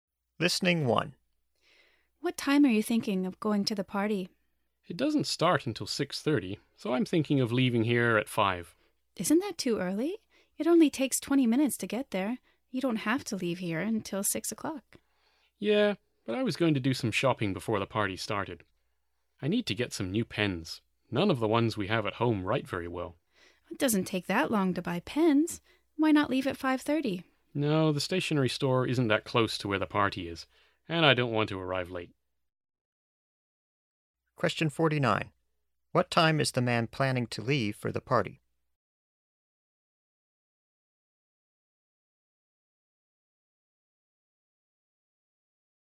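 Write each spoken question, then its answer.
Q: What time is the man planning to leave for the party?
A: At 5 o'clock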